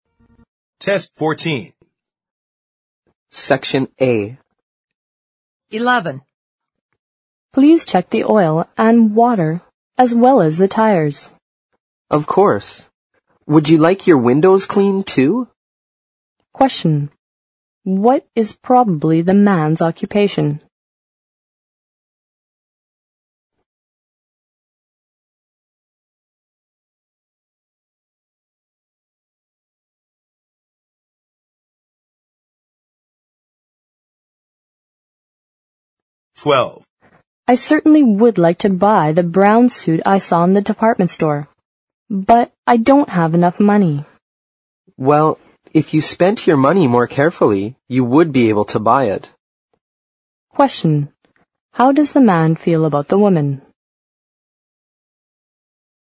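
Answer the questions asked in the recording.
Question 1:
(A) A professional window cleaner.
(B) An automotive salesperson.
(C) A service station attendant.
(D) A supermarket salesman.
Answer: (C) A service station attendant.
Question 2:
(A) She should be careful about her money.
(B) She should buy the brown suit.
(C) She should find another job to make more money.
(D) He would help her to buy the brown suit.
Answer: (A) She should be careful about her money.

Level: 四级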